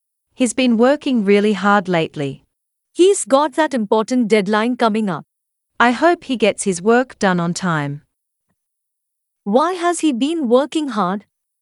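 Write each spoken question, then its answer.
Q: Why has he been working hard?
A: He has an important deadline coming up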